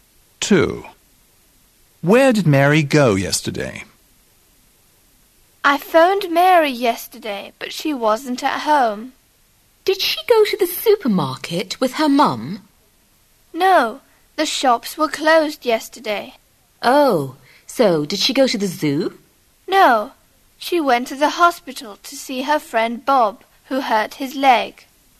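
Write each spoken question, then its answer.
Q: Where did Mary go yesterday?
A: To the hospital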